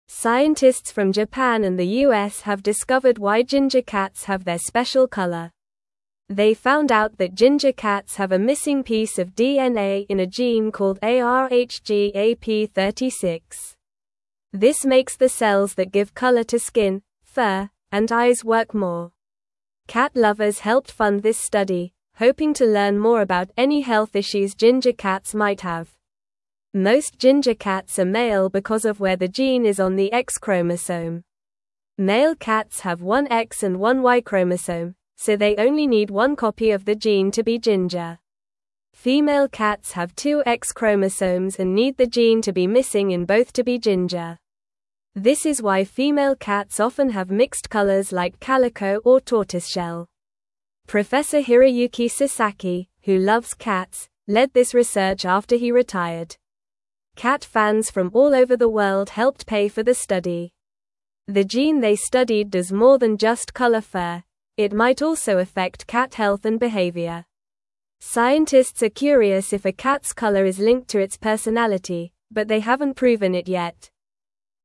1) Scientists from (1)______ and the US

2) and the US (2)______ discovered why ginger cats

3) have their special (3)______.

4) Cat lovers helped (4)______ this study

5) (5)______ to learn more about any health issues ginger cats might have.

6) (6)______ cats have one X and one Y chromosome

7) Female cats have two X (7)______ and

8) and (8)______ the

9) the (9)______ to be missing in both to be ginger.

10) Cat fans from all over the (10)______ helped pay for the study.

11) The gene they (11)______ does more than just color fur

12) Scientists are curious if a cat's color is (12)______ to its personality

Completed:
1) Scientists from Japan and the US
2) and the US have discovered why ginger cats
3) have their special color.
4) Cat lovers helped fund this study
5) hoping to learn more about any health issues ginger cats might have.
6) Male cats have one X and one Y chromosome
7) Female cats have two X chromosomes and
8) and need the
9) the gene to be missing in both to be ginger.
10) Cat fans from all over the world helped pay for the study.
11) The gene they studied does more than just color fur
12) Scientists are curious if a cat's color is linked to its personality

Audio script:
Scientists from Japan and the US have discovered why ginger cats have their special color. They found out that ginger cats have a missing piece of DNA in a gene called ARHGAP36. This makes the cells that give color to skin, fur, and eyes work more. Cat lovers helped fund this study, hoping to learn more about any health issues ginger cats might have.
Most ginger cats are male because of where the gene is on the X chromosome. Male cats have one X and one Y chromosome, so they only need one copy of the gene to be ginger. Female cats have two X chromosomes and need the gene to be missing in both to be ginger. This is why female cats often have mixed colors like calico or tortoiseshell.
Professor Hiroyuki Sasaki, who loves cats, led this research after he retired. Cat fans from all over the world helped pay for the study. The gene they studied does more than just color fur; it might also affect cat health and behavior. Scientists are curious if a cat's color is linked to its personality, but they haven't proven it yet.

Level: Level 2